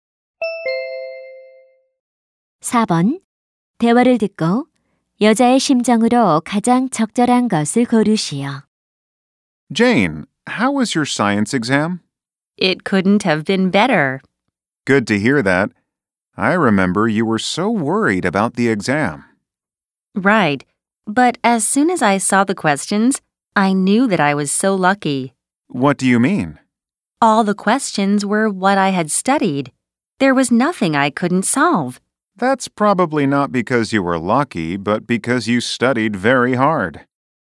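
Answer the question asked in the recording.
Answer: 기쁘고 만족스러움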